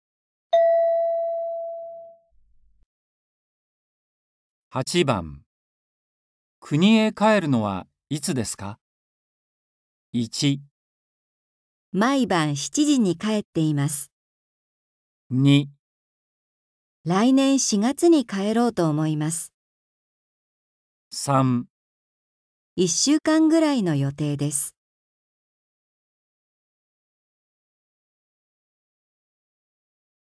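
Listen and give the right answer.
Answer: 2

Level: N4.36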